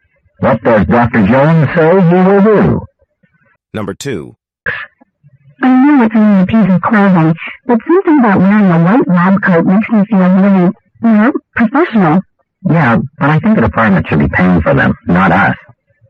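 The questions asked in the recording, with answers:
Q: What does the man say about lab coats?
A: The department should pay for them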